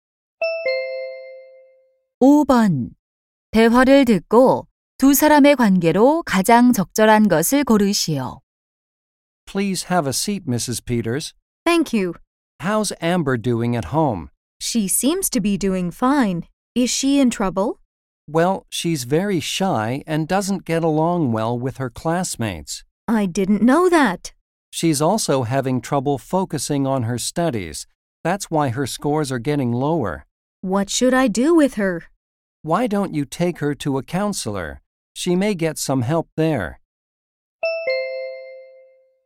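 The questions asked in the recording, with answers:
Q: 대화를 듣고 두 사람의 관계로 가장 적절한 것을 고르시오.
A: 교사와 학부모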